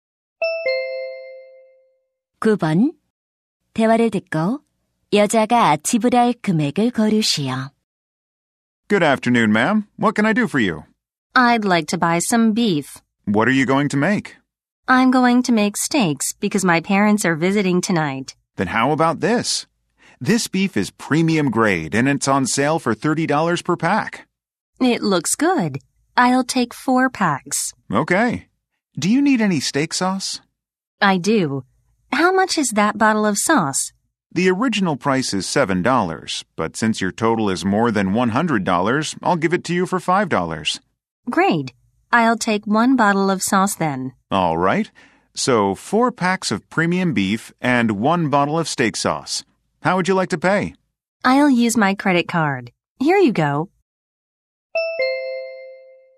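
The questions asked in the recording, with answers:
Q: 대화를 듣고 여자가 지불할 금액을 고르시오.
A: $125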